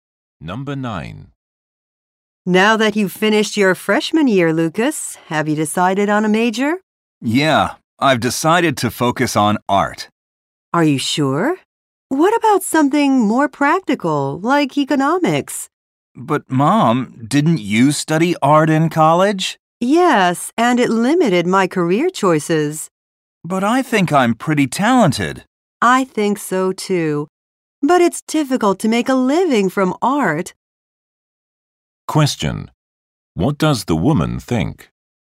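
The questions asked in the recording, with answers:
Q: What does the woman think?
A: Her son should study something more practical, since it's hard to make a living from art.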